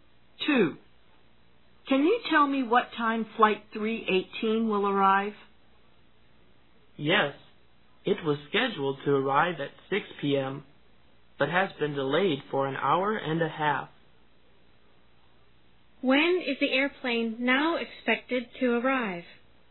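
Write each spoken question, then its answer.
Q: When is the airplane now expected to arrive?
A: 7:30 p.m.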